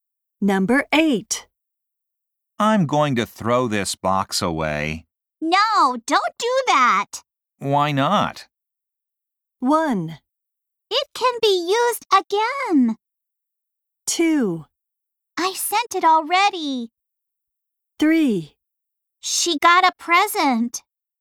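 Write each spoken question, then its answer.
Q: Why not?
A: 1: It can be used again.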